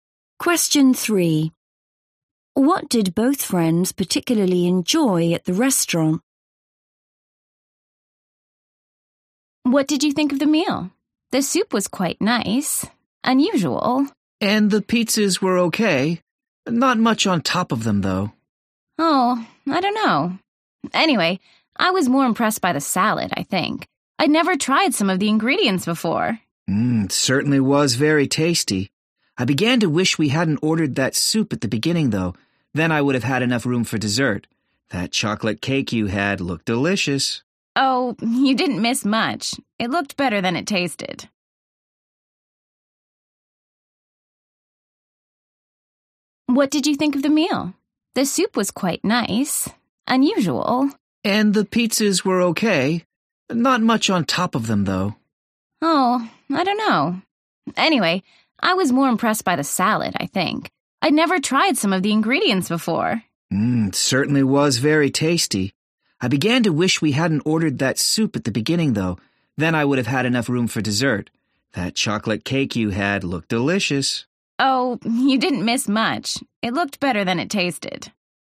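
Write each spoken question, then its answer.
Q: What did both friends particularly enjoy at the restaurant?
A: the salad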